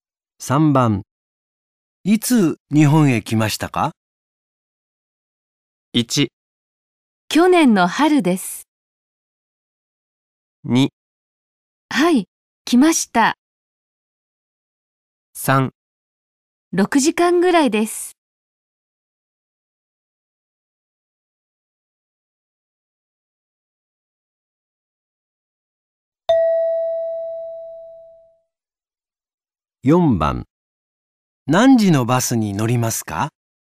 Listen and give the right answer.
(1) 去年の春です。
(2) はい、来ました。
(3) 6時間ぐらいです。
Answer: (1) 去年の春です。

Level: N5 Listening · Test 3